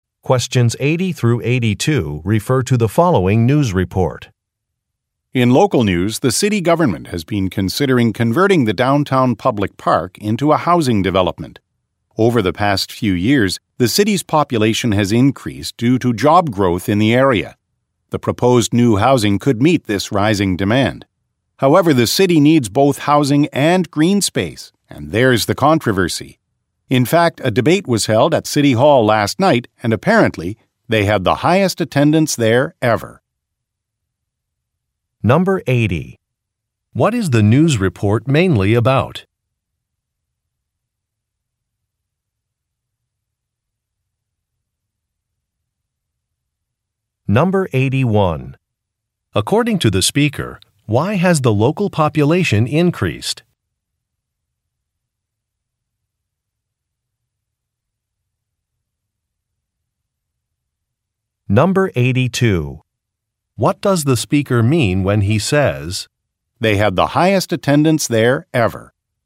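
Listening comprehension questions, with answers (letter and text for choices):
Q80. What is the news report mainly about?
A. A tourism initiative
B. Plans for a city property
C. The results of an election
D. The price of housing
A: B. Plans for a city property

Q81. According to the speaker, why has the local population increased?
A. A university has been built.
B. Public transportation has improved.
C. More jobs are available.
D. Some historical sites have opened.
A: C. More jobs are available.

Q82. What does the speaker mean when he says, "they had the highest attendance there ever"?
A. He has been a reporter for many years.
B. Future meetings will need to be held somewhere else.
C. Residents are very interested in a topic.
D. The city hall has finally been renovated.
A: C. Residents are very interested in a topic.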